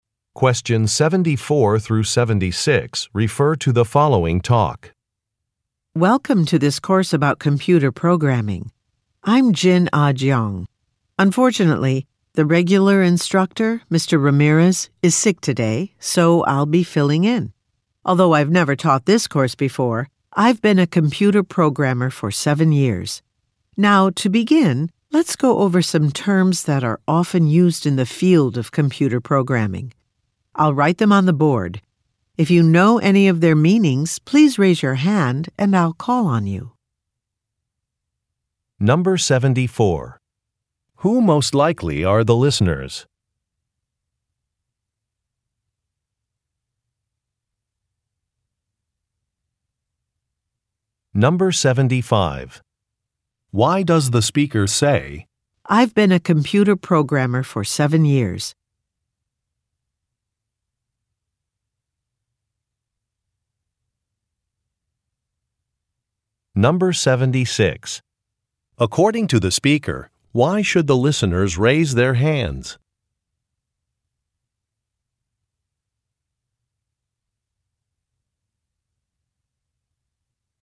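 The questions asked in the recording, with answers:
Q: Who most likely are the listeners?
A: Students in a computer programming course

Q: According to the speaker, why should the listeners raise their hands?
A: To explain the meaning of a term they know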